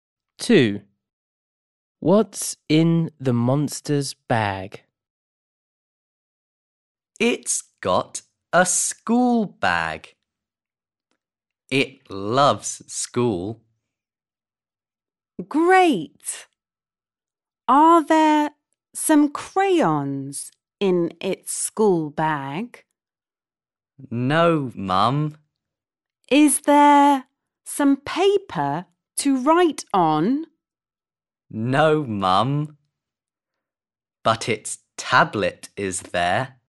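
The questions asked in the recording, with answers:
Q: What's in the monster's bag?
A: its tablet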